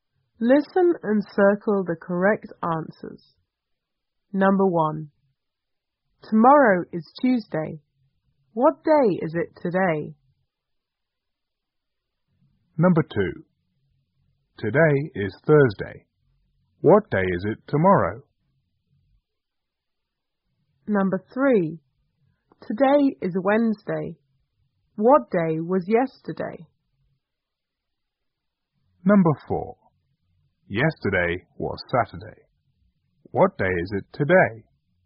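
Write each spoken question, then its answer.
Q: What day is it today?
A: Monday

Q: What day is it tomorrow?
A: Friday

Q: What day was yesterday?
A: Tuesday

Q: What day is it today?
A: Sunday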